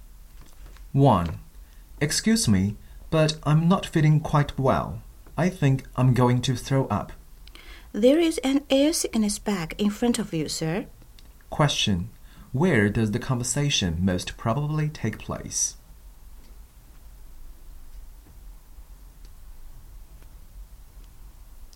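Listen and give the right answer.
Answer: On a plane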